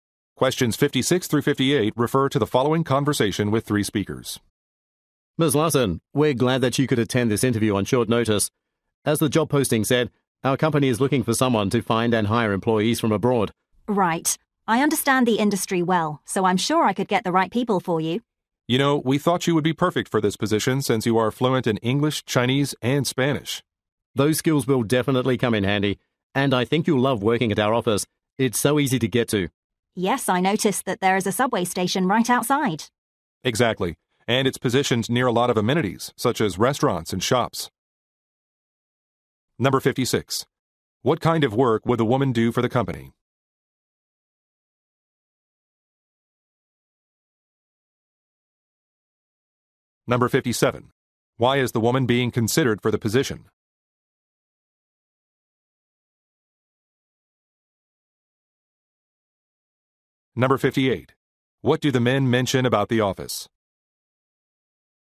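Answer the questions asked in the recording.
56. Finding and hiring employees from abroad
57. She is fluent in English, Chinese, and Spanish
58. It is easy to get to, with a subway station right outside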